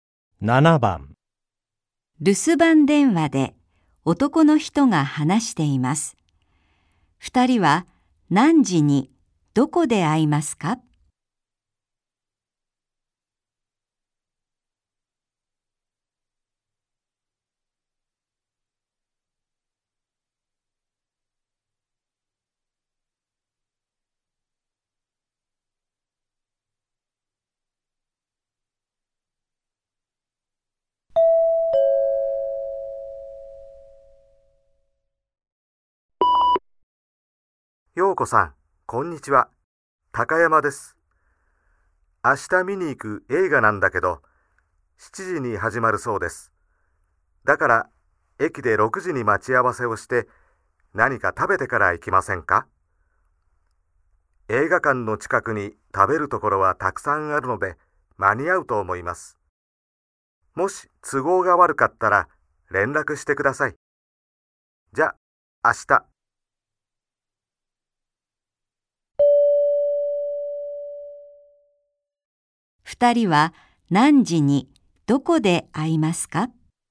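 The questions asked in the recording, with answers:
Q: 二人は何時にどこで会いますか?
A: 6時に駅で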